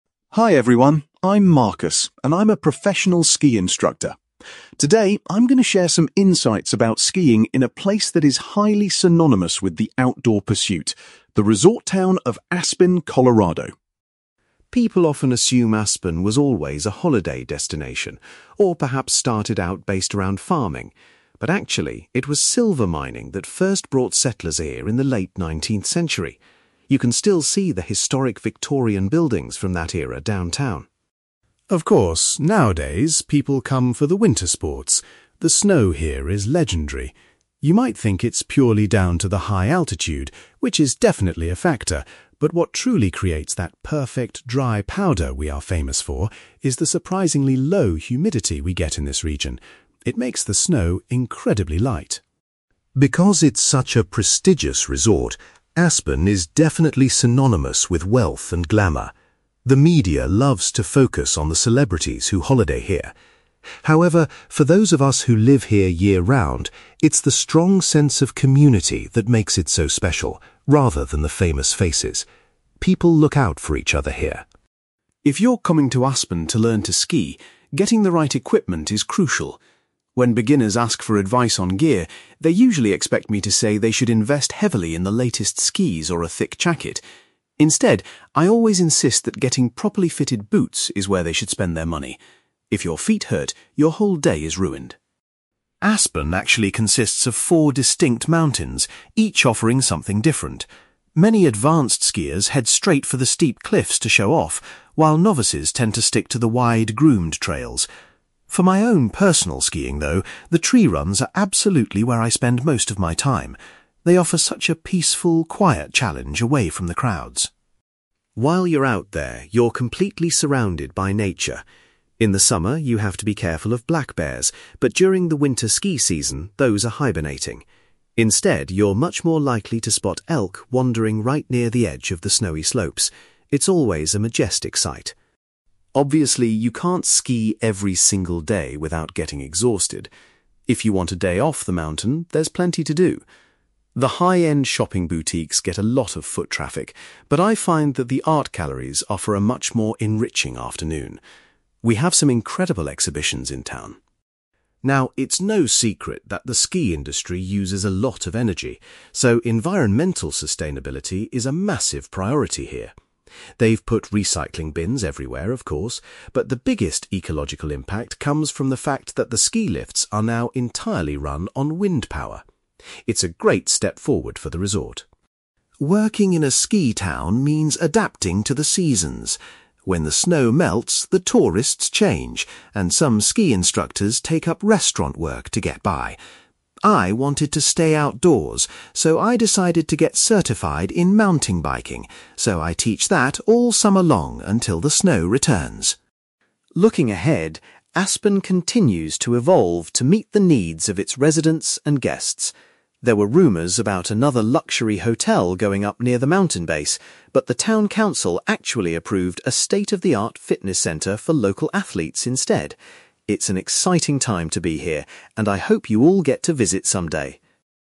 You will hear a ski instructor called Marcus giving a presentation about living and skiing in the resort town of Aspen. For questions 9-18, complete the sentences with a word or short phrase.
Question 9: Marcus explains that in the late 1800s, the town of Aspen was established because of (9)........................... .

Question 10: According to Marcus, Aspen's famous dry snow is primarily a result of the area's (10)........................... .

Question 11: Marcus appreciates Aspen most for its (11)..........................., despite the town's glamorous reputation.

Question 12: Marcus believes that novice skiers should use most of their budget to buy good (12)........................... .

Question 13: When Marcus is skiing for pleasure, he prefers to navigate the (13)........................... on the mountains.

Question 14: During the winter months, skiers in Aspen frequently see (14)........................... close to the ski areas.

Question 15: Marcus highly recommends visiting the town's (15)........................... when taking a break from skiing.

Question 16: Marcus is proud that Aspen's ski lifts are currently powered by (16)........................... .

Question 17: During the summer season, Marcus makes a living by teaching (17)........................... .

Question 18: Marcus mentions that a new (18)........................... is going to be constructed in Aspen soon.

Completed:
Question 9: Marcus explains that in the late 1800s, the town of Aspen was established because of silver mining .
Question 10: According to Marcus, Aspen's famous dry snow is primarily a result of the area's low humidity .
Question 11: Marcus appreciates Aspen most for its community, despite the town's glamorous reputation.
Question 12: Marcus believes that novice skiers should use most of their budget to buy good boots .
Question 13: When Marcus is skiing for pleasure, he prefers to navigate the tree runs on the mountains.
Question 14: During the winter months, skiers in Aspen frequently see elk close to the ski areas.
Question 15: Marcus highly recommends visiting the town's art galleries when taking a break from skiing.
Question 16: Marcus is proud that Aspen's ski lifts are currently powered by wind power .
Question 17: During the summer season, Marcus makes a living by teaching mountain biking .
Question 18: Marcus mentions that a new fitness centre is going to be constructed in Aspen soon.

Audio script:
Marcus: Hi everyone, I'm Marcus, and I'm a professional ski instructor. Today, I'm going to share some insights about skiing in a place that is highly synonymous with the outdoor pursuit: the resort town of Aspen, Colorado.
People often assume Aspen was always a holiday destination, or perhaps started out based around farming. But actually, it was silver mining that first brought settlers here in the late nineteenth century. You can still see the historic Victorian buildings from that era downtown.
Of course, nowadays, people come for the winter sports. The snow here is legendary. You might think it's purely down to the high altitude, which is definitely a factor, but what truly creates that perfect, dry powder we are famous for is the surprisingly low humidity we get in this region. It makes the snow incredibly light.
Because it's such a prestigious resort, Aspen is definitely synonymous with wealth and glamour. The media loves to focus on the celebrities who holiday here. However, for those of us who live here year-round, it's the strong sense of community that makes it so special, rather than the famous faces. People look out for each other here.
If you're coming to Aspen to learn to ski, getting the right equipment is crucial. When beginners ask for advice on gear, they usually expect me to say they should invest heavily in the latest skis or a thick jacket. Instead, I always insist that getting properly fitted boots is where they should spend their money. If your feet hurt, your whole day is ruined.
Aspen actually consists of four distinct mountains, each offering something different. Many advanced skiers head straight for the steep cliffs to show off, while novices tend to stick to the wide, groomed trails. For my own personal skiing, though, the tree runs are absolutely where I spend most of my time. They offer such a peaceful, quiet challenge away from the crowds.
While you're out there, you're completely surrounded by nature. In the summer, you have to be careful of black bears, but during the winter ski season, those are hibernating. Instead, you're much more likely to spot elk wandering right near the edge of the snowy slopes. It's always a majestic sight.
Obviously, you can't ski every single day without getting exhausted. If you want a day off the mountain, there's plenty to do. The high-end shopping boutiques get a lot of foot traffic, but I find that the art galleries offer a much more enriching afternoon. We have some incredible exhibitions in town.
Now, it's no secret that the ski industry uses a lot of energy, so environmental sustainability is a massive priority here. They've put recycling bins everywhere, of course, but the biggest ecological impact comes from the fact that the ski lifts are now entirely run on wind power. It's a great step forward for the resort.
Working in a ski town means adapting to the seasons. When the snow melts, the tourists change, and some ski instructors take up restaurant work to get by. I wanted to stay outdoors, so I decided to get certified in mountain biking, so I teach that all summer long until the snow returns.
Looking ahead, Aspen continues to evolve to meet the needs of its residents and guests. There were rumors about another luxury hotel going up near the mountain base, but the town council actually approved a state-of-the-art fitness centre for local athletes instead. It's an exciting time to be here, and I hope you all get to visit someday!

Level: B2